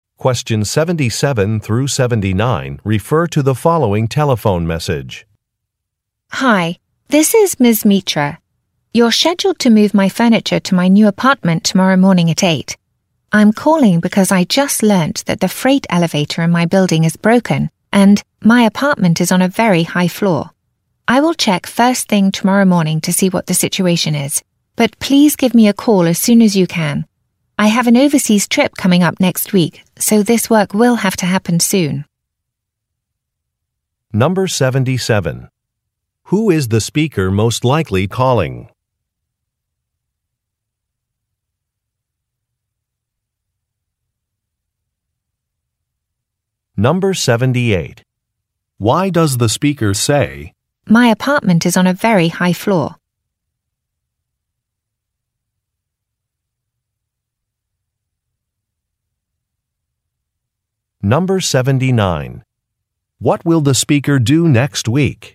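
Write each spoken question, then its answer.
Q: Who is the speaker most likely calling?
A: A moving company

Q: Why does the speaker say, "My apartment is on a very high floor"?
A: To say that moving the furniture without the freight elevator would be difficult

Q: What will the speaker do next week?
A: Go on an overseas trip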